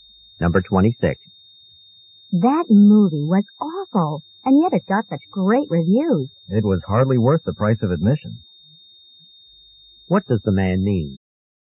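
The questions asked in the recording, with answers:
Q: What does the man mean?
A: The movie wasn't worth the money.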